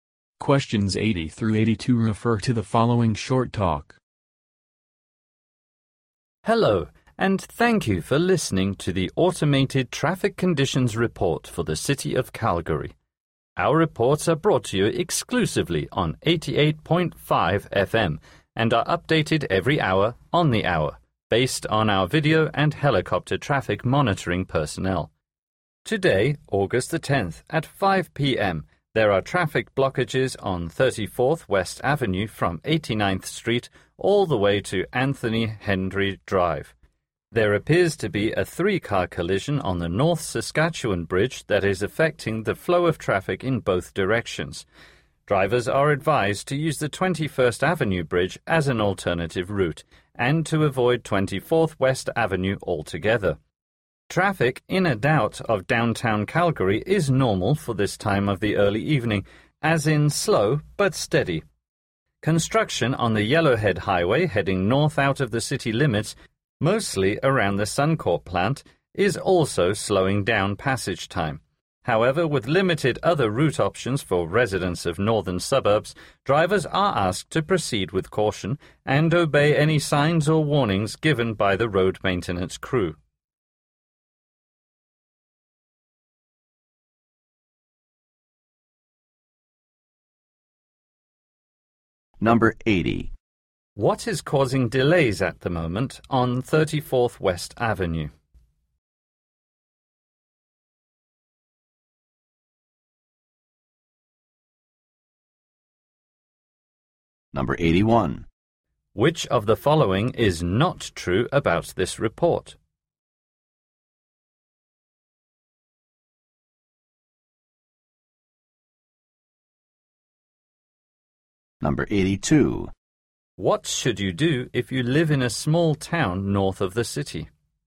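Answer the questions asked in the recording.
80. A three-car collision on the bridge
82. Proceed with caution and obey the road crew's signs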